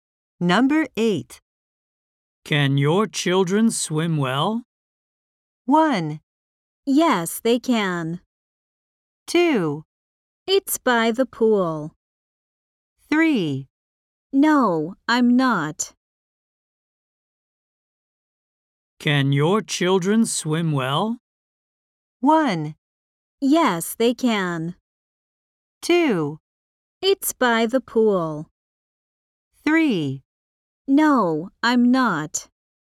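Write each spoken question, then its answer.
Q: Can your children swim well?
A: 1: Yes, they can.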